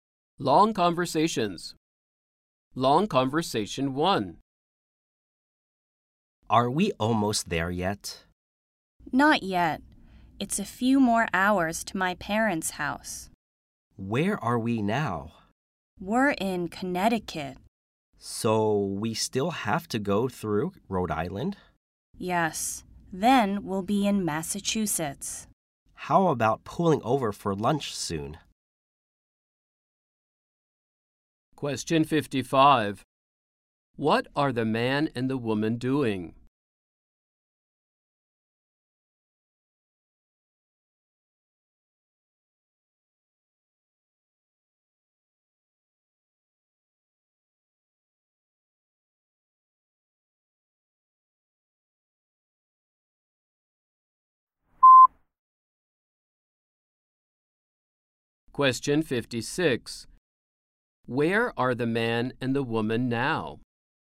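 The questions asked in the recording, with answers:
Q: What are the man and the woman doing?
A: Driving to the man's parents' house

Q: Where are the man and the woman now?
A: In Connecticut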